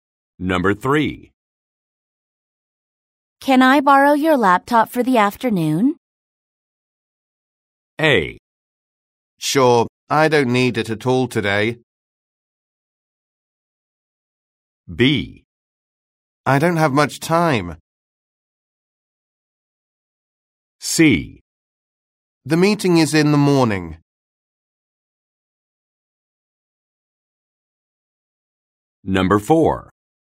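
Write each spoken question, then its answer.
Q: Can I borrow your laptop for the afternoon?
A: A: Sure, I don't need it at all today.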